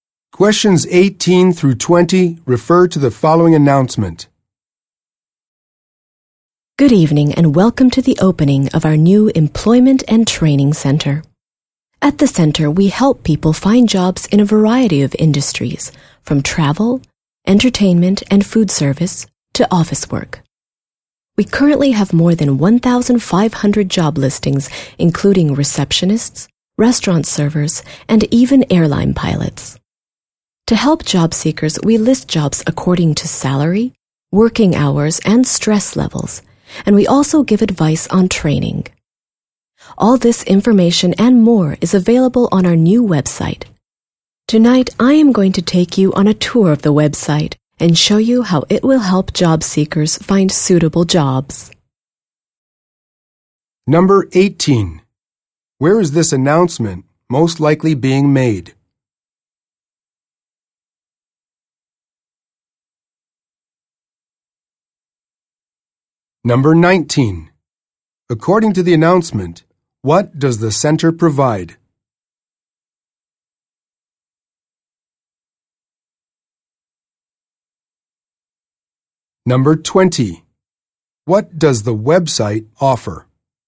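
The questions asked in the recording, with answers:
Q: Where is this announcement most likely being made?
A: At the opening of the new Employment and Training Center

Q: According to the announcement, what does the center provide?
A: Help finding jobs, job listings and training advice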